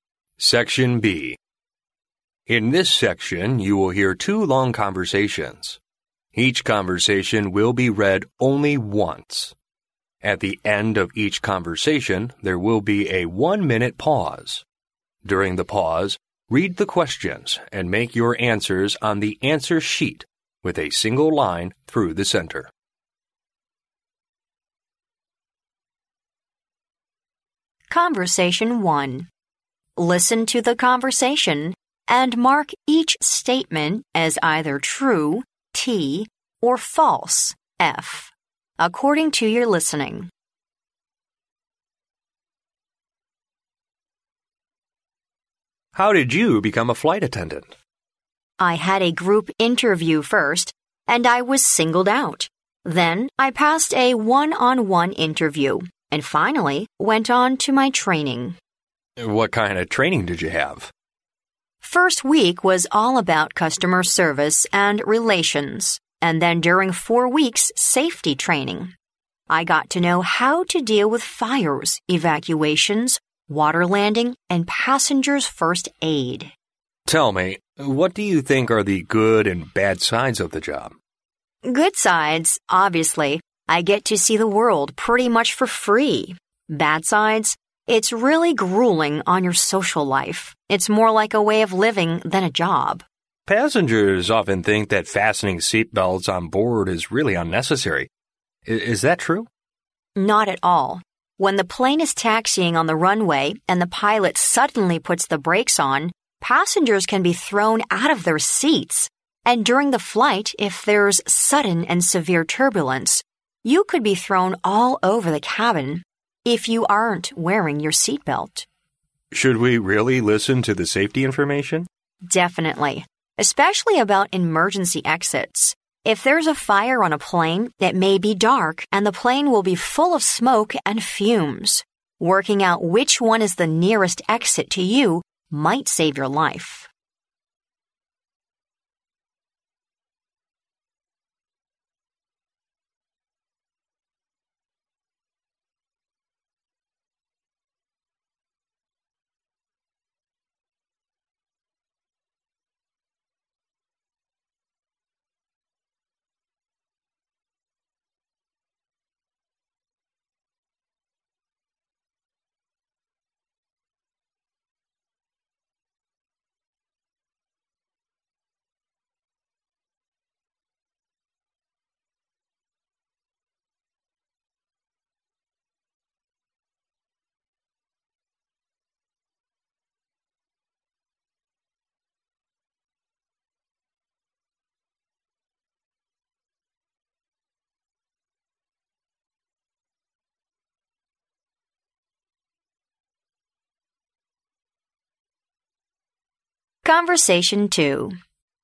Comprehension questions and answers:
Listen to the conversation, and mark each statement as either true (T) or false (F) according to your listening.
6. The woman went through two interviews to become a flight attendant.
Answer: T

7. The woman spent five weeks doing safety training.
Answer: F

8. The woman experienced jet lag each time she got off the plane.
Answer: F

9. Wearing seat belts will prevent passengers from being thrown all over the cabin when there's sudden and severe turbulence.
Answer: T

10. If a fire starts on a plane, passengers should wait for flight attendants to lead them to the nearest emergency exit.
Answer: F

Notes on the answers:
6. 录音中女士说到自己先参加了"group interview",然后参加了"one-on-one interview",因此是两次面试。陈述正确。
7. 录音中女士说自己参加了"four weeks' safety training"。因此陈述不正确。
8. 录音中没有提到"jet lag"。因此陈述不正确。
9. 录音中女士说到"you could be thrown all over the cabin if you aren't wearing your seat belt"。因此陈述正确。
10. 录音中男士问道人们是否应该听安全信息,女士回答当然了,尤其是关于紧急出口的信息,弄清楚离自己最近的安全出口可能会救自己的命。由此可知,当发生火灾时,乘客们应该自己去最近的安全出口。因此陈述不正确。

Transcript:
M: How did you become a flight attendant?
W: I had a group interview first and I was singled out. Then I passed a one-on-one interview, and finally went on to my training.
M: What kind of training did you have?
W: First week was all about customer service and relations, and then during four weeks' safety training, I got to know how to deal with fires, evacuations, water landing, and passengers' first-aid.
M: Tell me, what do you think are the good and bad sides of the job?
W: Good sides, obviously I get to see the world pretty much for free. Bad sides, it's really grueling on your social life. It's more like a way of living than a job.
M: Passengers often think that fastening seat belts on board is really unnecessary. Is that true?
W: Not at all. When the plane is taxiing on the runway and the pilot suddenly puts the brakes on, passengers can be thrown out of their seats. And during the flight if there's sudden and severe turbulence, you could be thrown all over the cabin if you aren't wearing your seat belt.
M: Should we really listen to the safety information?
W: Definitely, especially about emergency exits. If there's a fire on a plane, it may be dark and the plane will be full of smoke and fumes. Working out which one is the nearest exit to you might save your life.